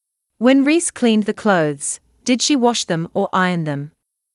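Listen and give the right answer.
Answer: wash them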